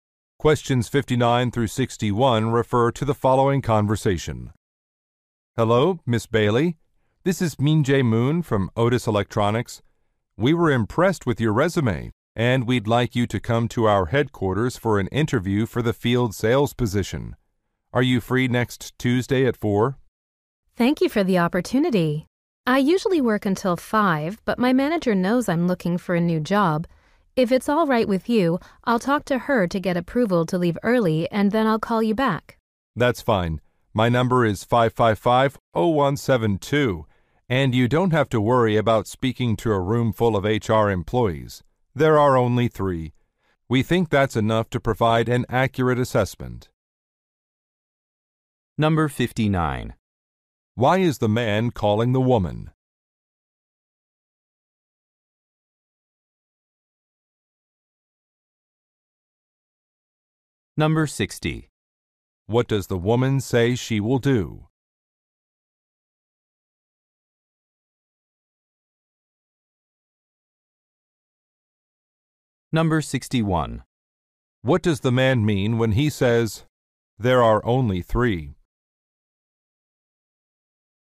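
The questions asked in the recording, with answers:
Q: Why is the man calling the woman?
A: To invite her to a job interview

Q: What does the woman say she will do?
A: Ask her manager for permission to leave early

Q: What does the man mean when he says, "There are only 3?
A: She shouldn't worry because the interview panel is small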